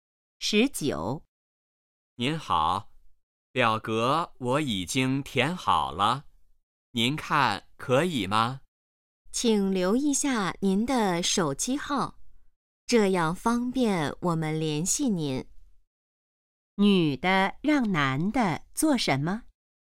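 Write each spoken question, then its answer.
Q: 女的让男的做什么?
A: 留手机号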